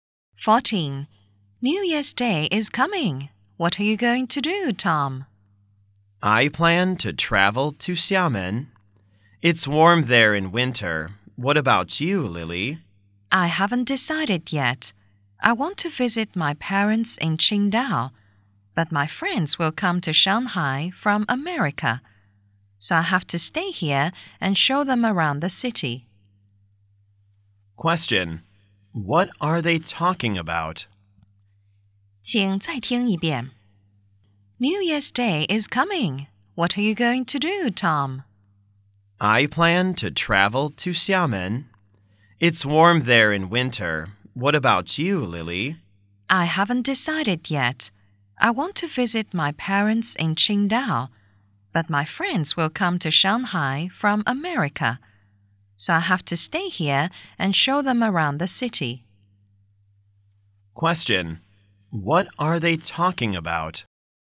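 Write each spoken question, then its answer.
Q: What are they talking about?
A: Their plans for New Year's Day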